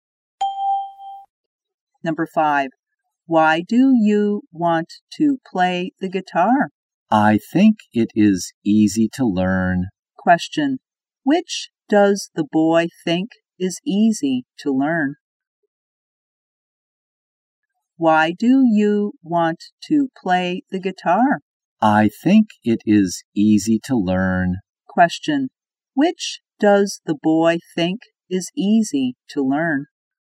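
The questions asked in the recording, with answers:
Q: which does the boy think is easy to learn?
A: The guitar.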